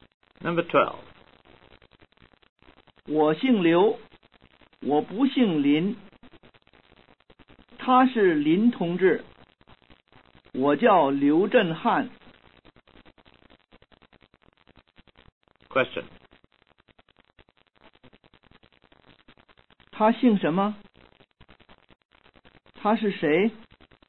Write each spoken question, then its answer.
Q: 他姓什么?他是谁?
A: 他姓林,他是林同志。